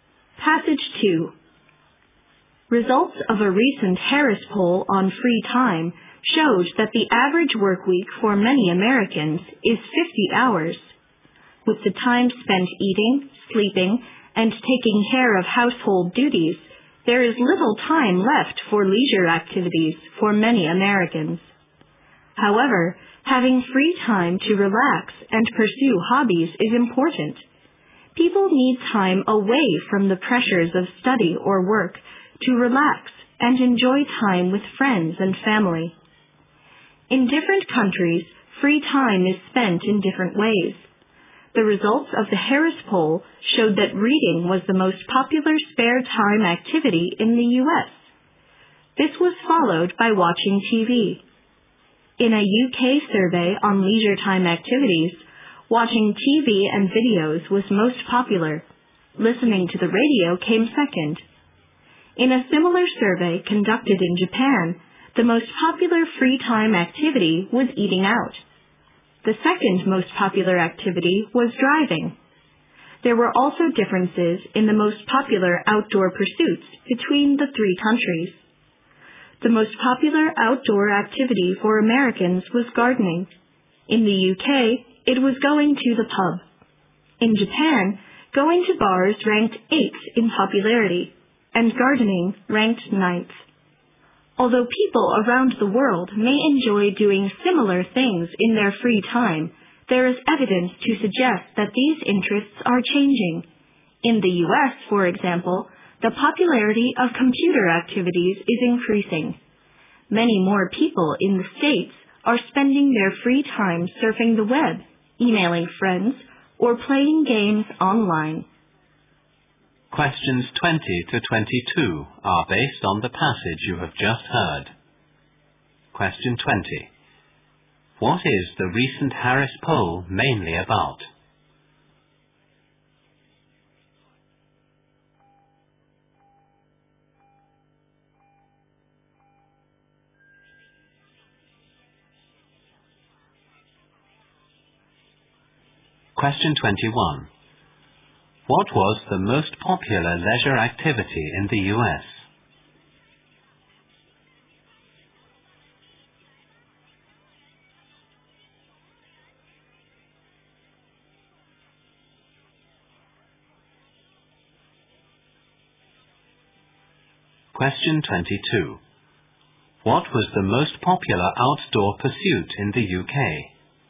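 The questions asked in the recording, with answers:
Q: What is the recent Harris poll mainly about?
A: How people spend their free time

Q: What was the most popular leisure activity in the U.S.?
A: Reading

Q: What was the most popular outdoor pursuit in the U.K.?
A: Going to the pub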